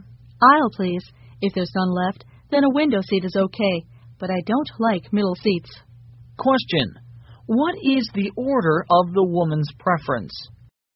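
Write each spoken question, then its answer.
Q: What is the order of the woman's preference?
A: Aisle seat first, then window seat, and middle seat last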